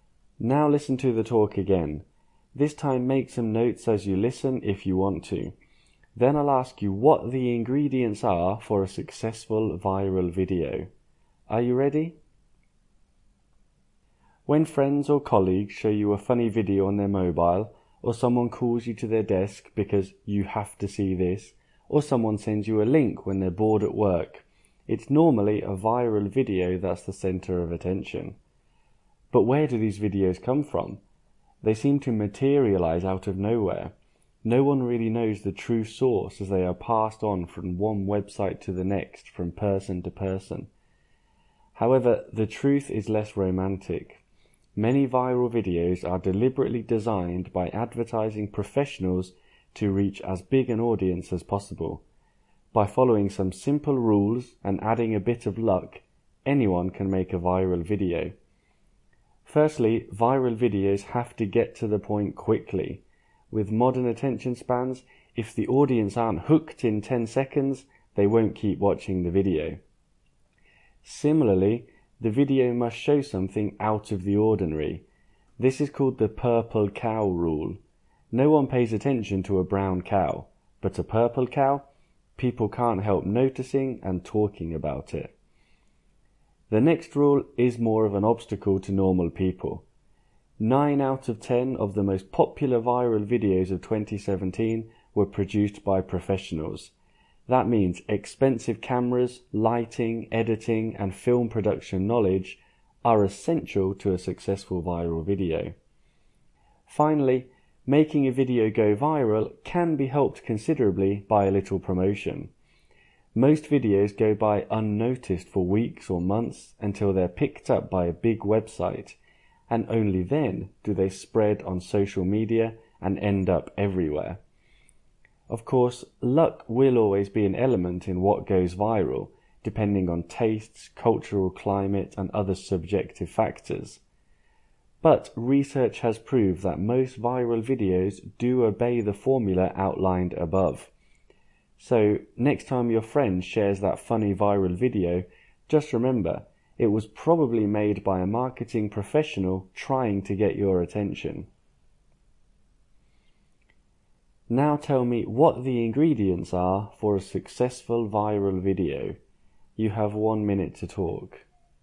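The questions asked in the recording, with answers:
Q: Now tell me what the ingredients are for a successful viral video.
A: They get to the point quickly, show something unusual (the purple cow rule), are made professionally, get some promotion, and need a bit of luck.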